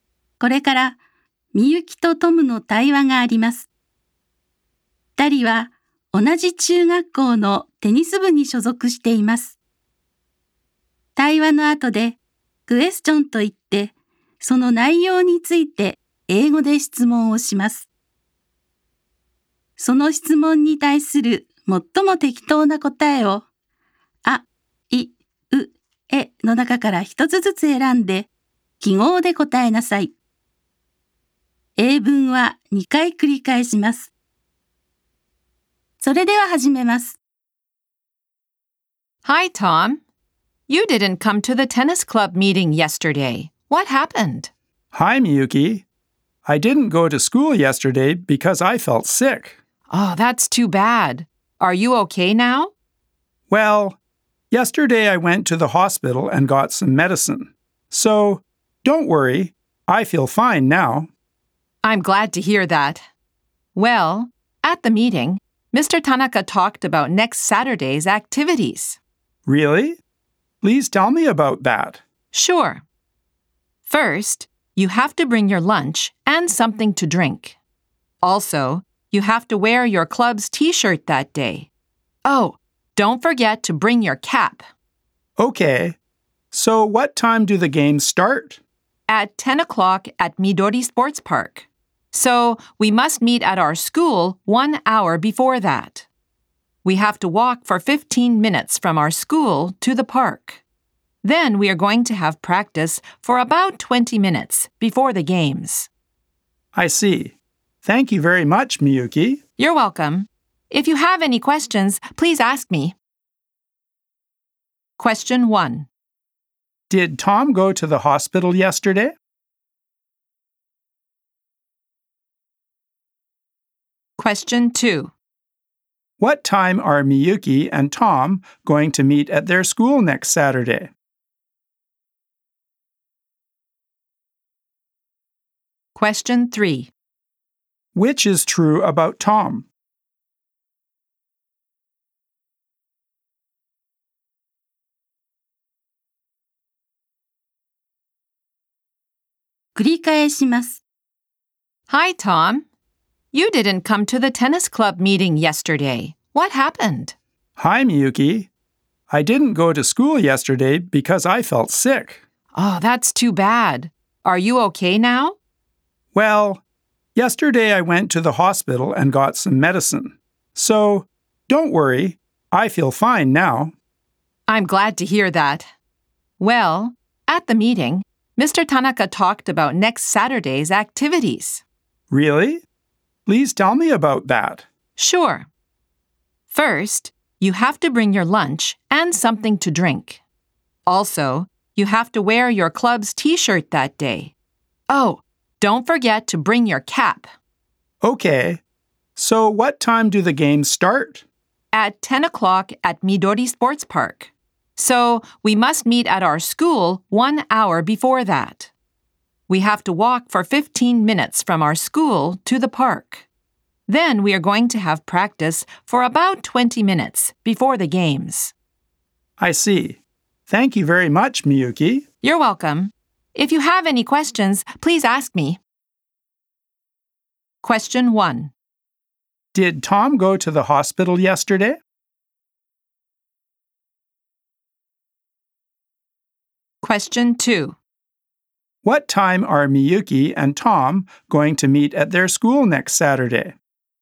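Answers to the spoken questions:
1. Yes, he did.
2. At 9 o'clock.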